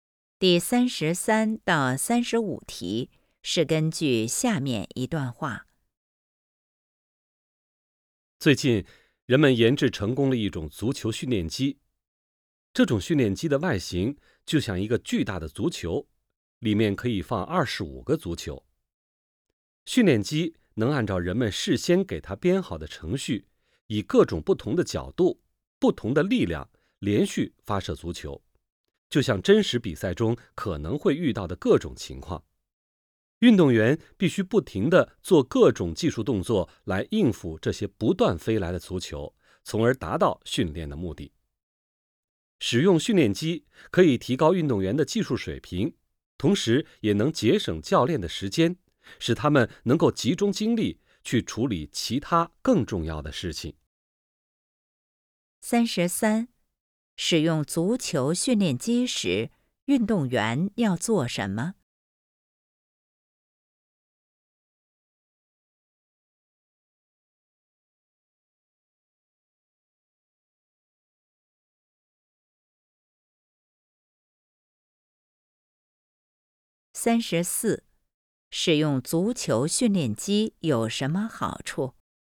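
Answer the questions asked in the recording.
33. 不停地做各种技术动作
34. 提高运动员技术水平,节省教练时间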